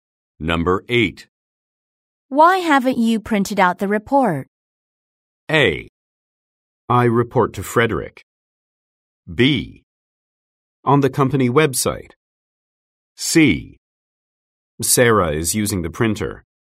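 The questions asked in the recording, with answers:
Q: Why haven't you printed out the report?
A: C: Sarah is using the printer.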